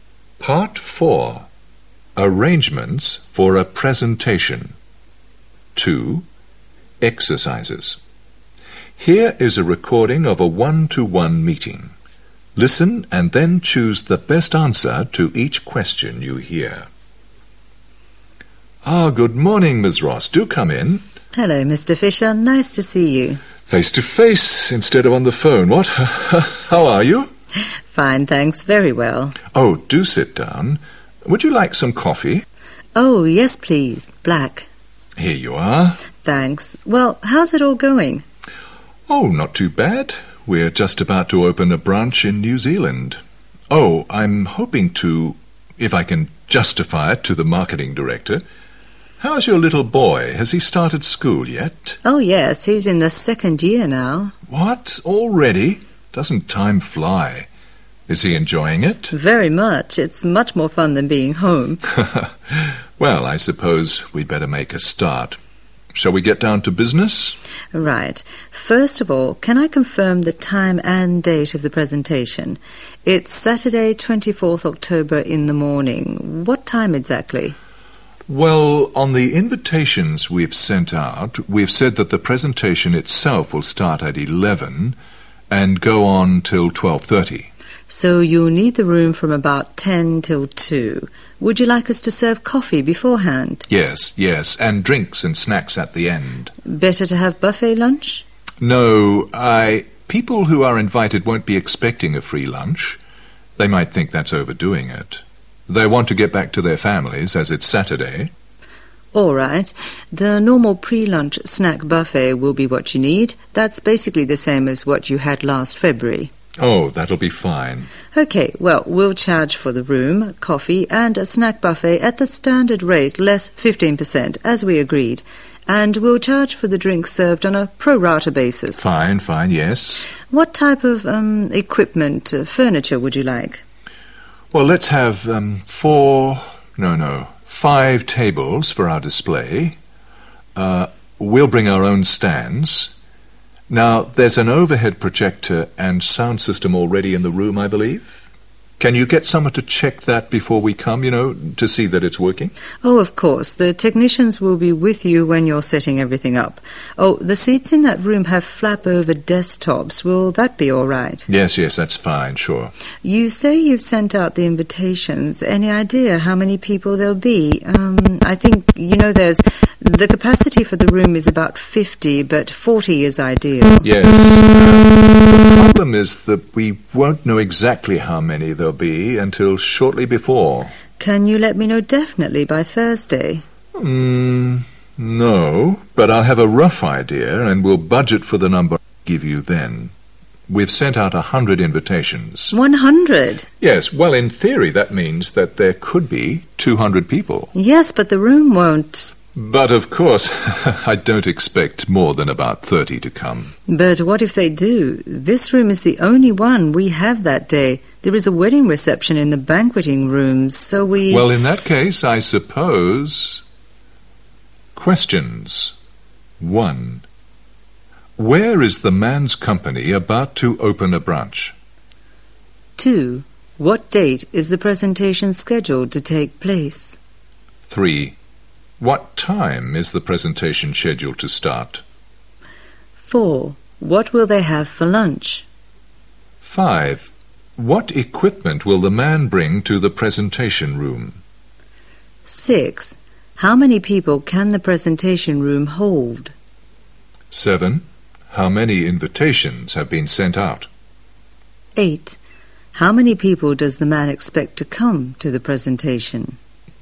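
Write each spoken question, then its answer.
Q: Where is the man's company about to open a branch?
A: New Zealand

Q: What date is the presentation scheduled to take place?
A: Saturday, 24th October

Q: What time is the presentation scheduled to start?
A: 11 o'clock

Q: What will they have for lunch?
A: No lunch, just the normal pre-lunch snack buffet

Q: What equipment will the man bring to the presentation room?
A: Their own stands

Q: How many people can the presentation room hold?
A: About 50

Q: How many invitations have been sent out?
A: 100

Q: How many people does the man expect to come to the presentation?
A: About 30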